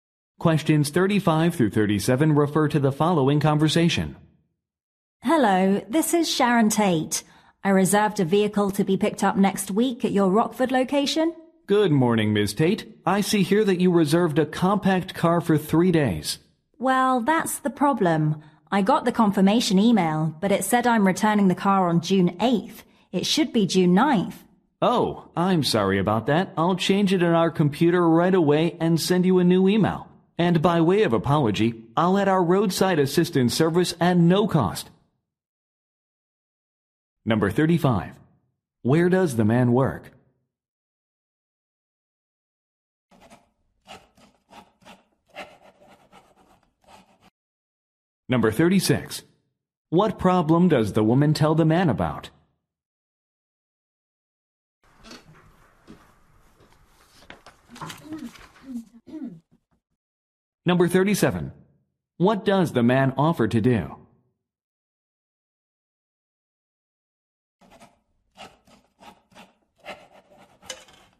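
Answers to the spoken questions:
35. At a car rental company
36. The return date in the confirmation email is wrong
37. Add free roadside assistance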